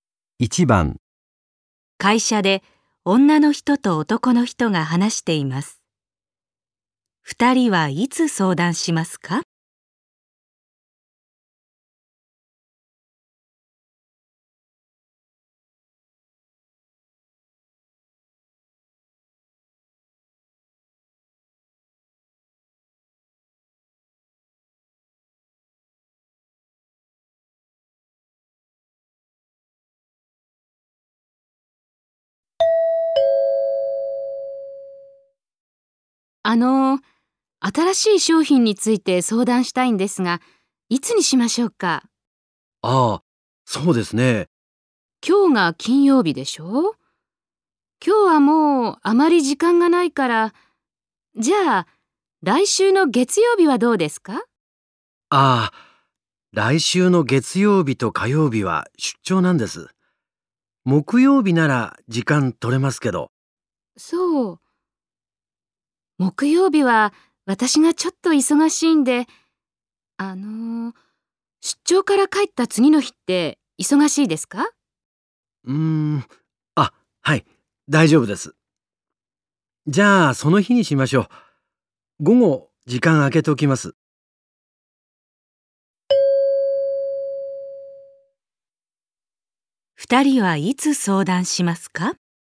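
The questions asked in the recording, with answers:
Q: 二人はいつ相談しますか?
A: 来週の水曜日の午後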